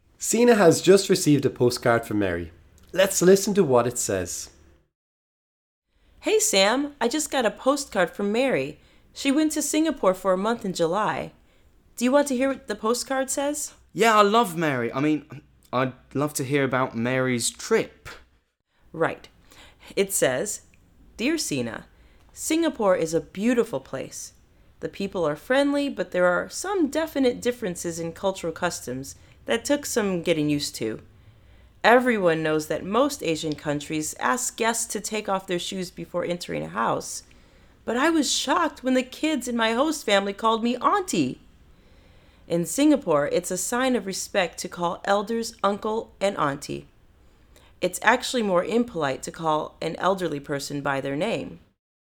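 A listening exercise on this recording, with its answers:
Sina receives a postcard from her friend Mary, and reads it to Sam.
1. What part of life in Singapore surprised Mary the most? Listen and choose the correct sentence.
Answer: The kids in her host family called her Auntie.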